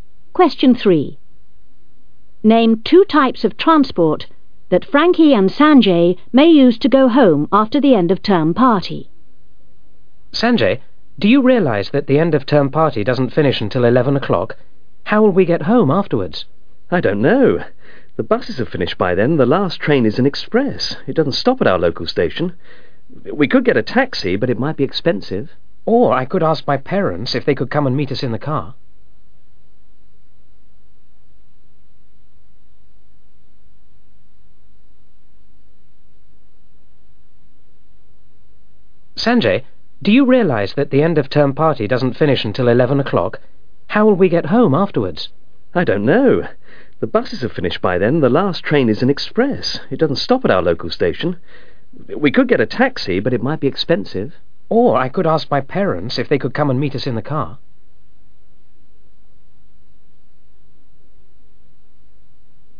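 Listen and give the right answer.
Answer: Taxi and (parents') car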